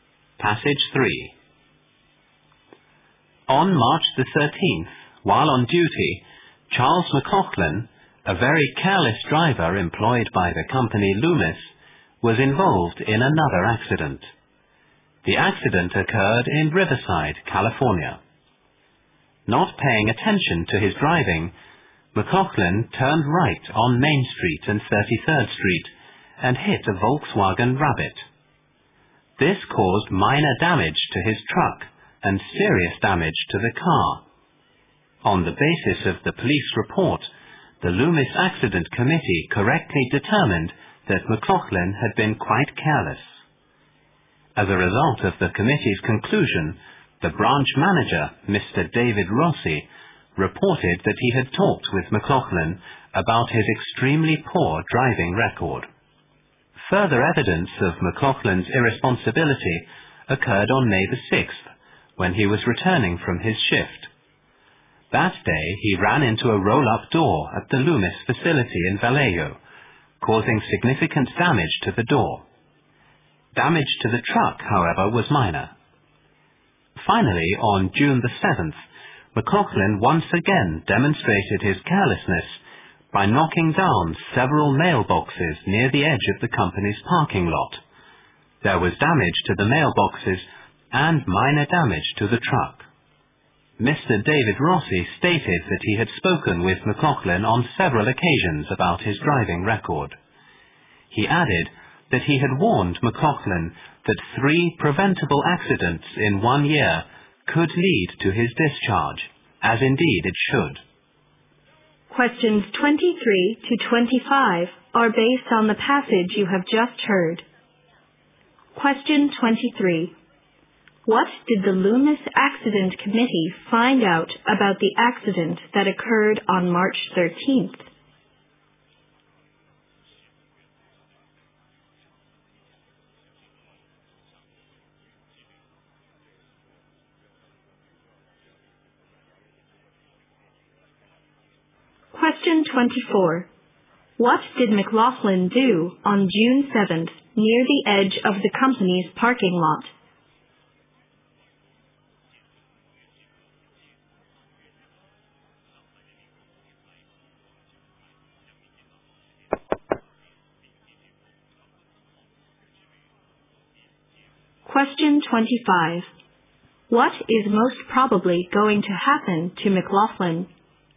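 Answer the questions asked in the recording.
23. McLaughlin had been careless
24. He knocked down several mailboxes
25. He will be fired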